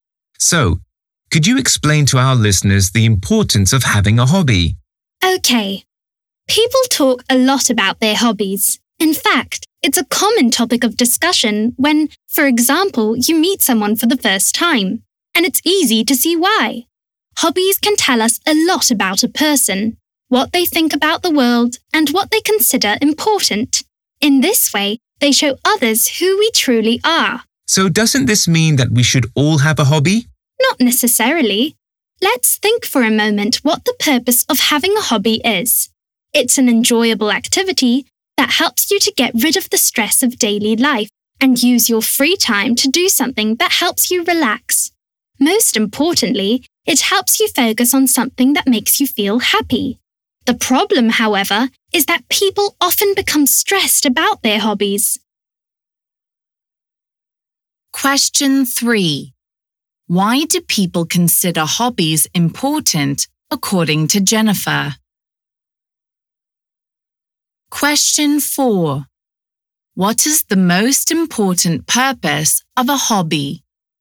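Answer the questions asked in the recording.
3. They show others who we truly are
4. To help you focus on something that makes you feel happy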